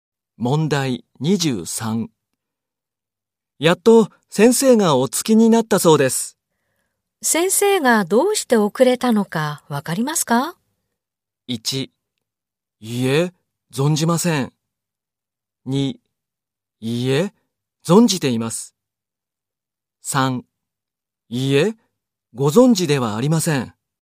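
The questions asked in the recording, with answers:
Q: 先生がどうして遅れたのかわかりますか?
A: 1: いいえ、存じません。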